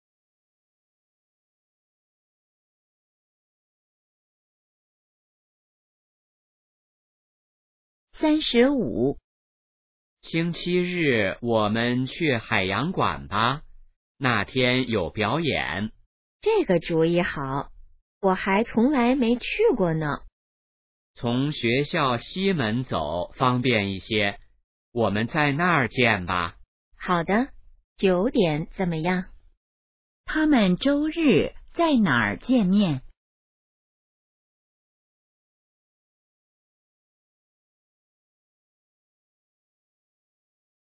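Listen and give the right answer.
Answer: 学校西门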